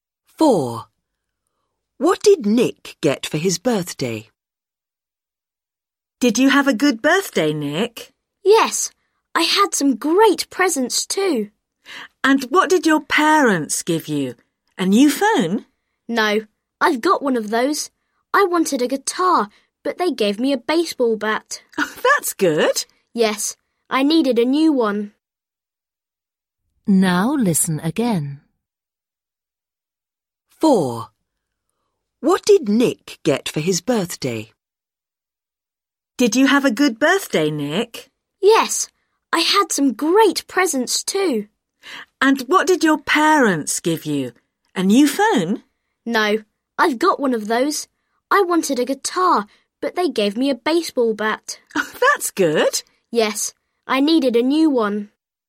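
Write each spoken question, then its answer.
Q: What did Nick get for his birthday?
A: A baseball bat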